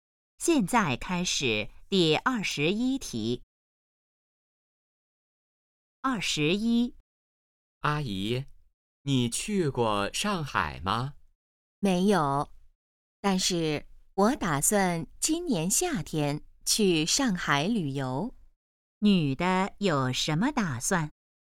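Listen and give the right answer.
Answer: 今年夏天去上海旅游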